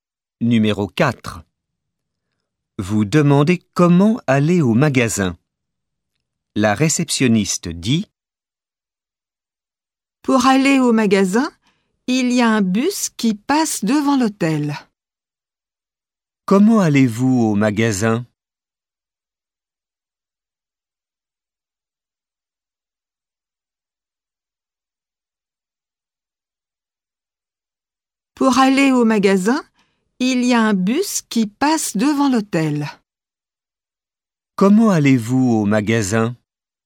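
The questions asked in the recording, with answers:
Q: Comment allez-vous au magasin ?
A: En bus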